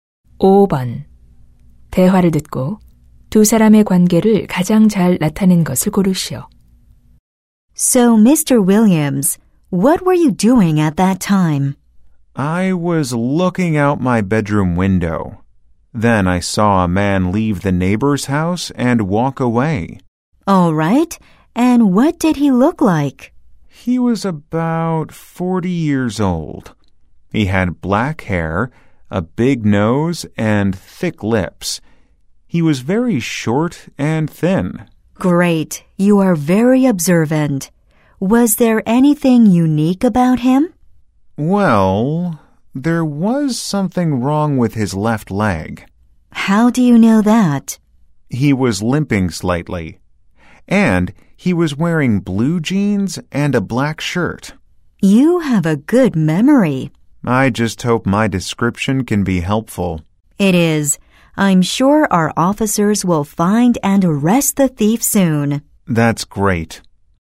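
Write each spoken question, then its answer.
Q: 대화를 듣고 두 사람의 관계를 가장 잘 나타낸 것을 고르시오.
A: 경찰관 - 목격자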